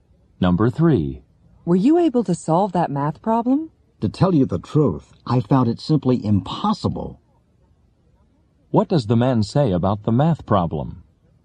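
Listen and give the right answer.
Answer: He couldn't solve it; it was impossible.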